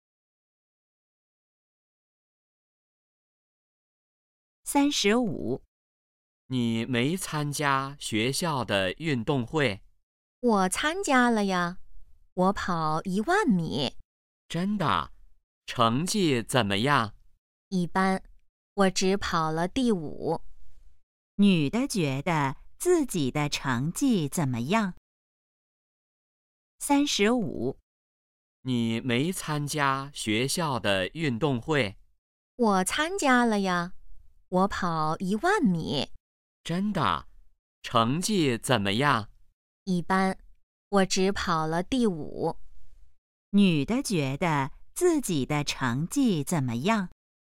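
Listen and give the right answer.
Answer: 一般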